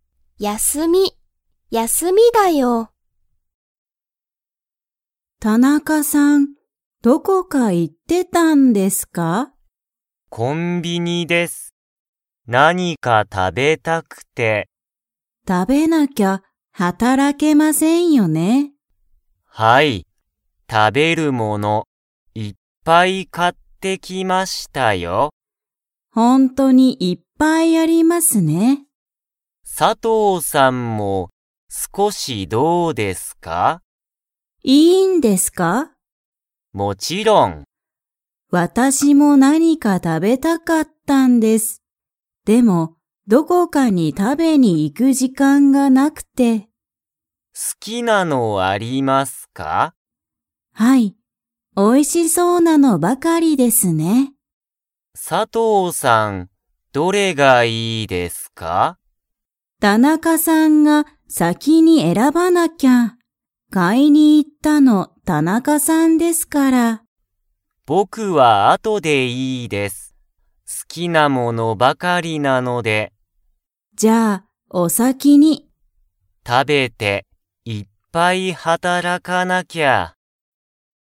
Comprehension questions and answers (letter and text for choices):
Comprehension Quiz (Skip if you don't understand the conversation yet)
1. 田中(たなか)さんは____物(もの)をいっぱい買(か)ってきた。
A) 働(はたら)く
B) 食(た)べる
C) 飲(の)む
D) 続(つづ)く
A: B) 食(た)べる

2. 田中(たなか)さんが先(さき)に選(えら)びますか?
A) はい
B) いいえ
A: B) いいえ

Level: Level 2